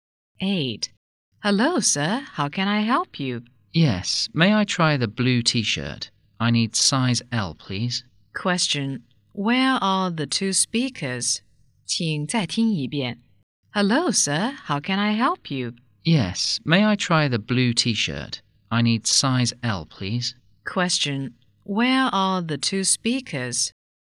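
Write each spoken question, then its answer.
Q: Where are the two speakers?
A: In a clothes shop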